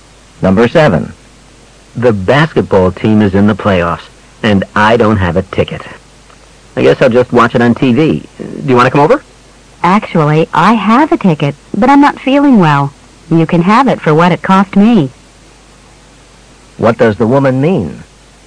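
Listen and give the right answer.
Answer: She will sell him her ticket for what it cost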